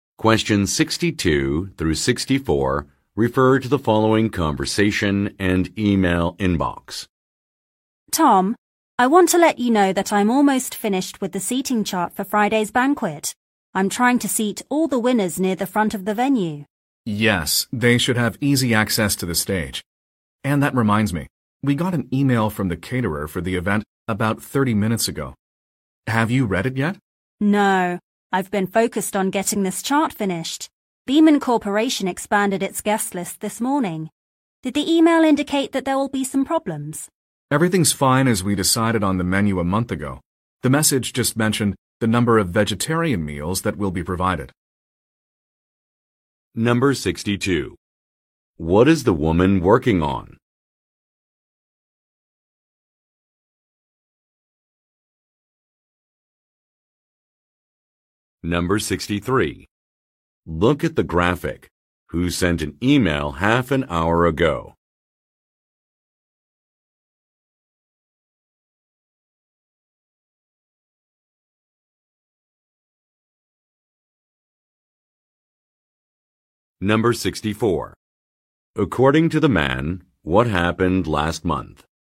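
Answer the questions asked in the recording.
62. A seating chart for Friday's banquet
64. The menu was decided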